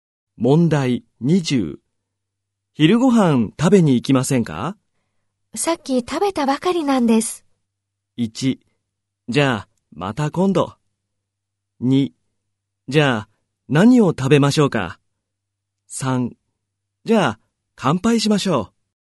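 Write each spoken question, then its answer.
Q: 昼ごはん食べに行きませんか?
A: 1: じゃあ、また今度。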